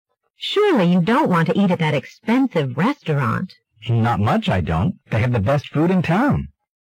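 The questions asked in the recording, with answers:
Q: What does the man mean?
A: He does want to eat there because the food is the best in town.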